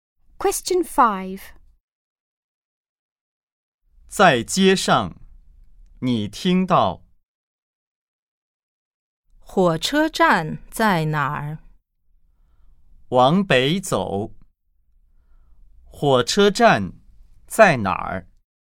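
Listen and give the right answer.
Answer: 往北走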